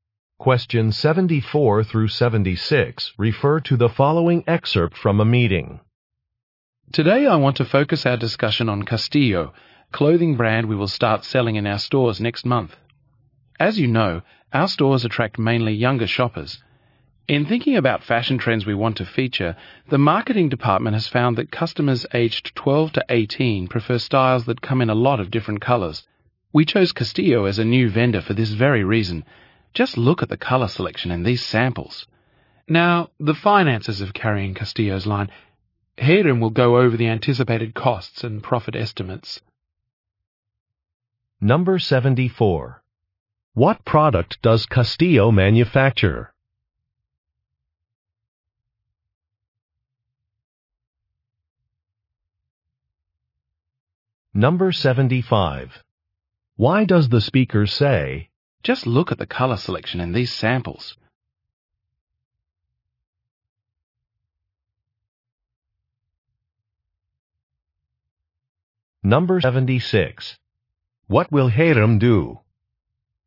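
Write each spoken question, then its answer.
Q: What product does Castillo manufacture?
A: Clothing

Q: What will Hiram do?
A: Go over the anticipated costs and profit estimates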